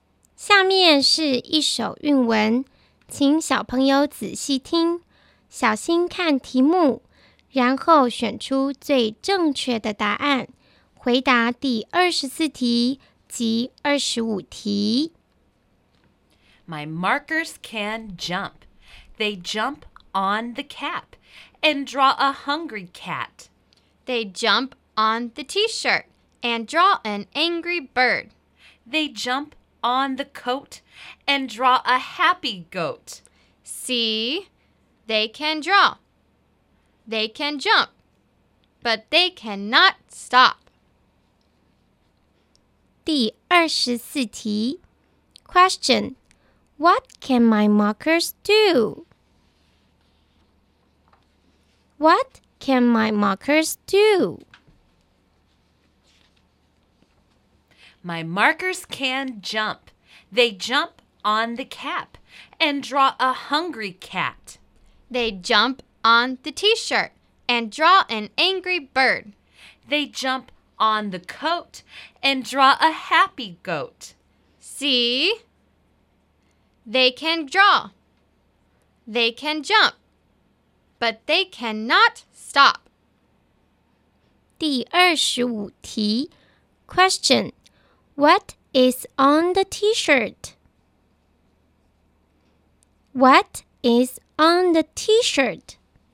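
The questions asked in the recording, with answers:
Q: Question, what can my markers do?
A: They can jump and draw.

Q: Question. What is on the t-shirt?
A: An angry bird.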